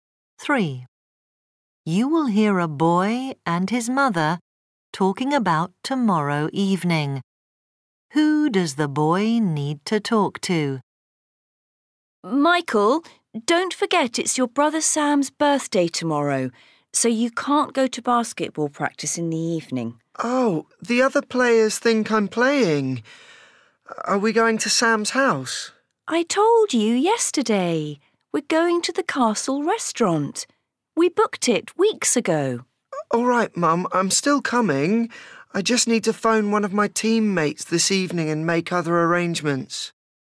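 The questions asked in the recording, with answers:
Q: Who does the boy need to talk to?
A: One of his basketball teammates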